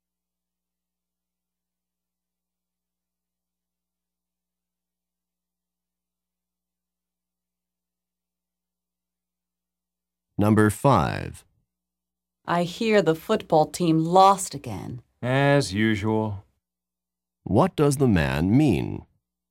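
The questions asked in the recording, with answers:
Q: What does the man mean?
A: The football team often loses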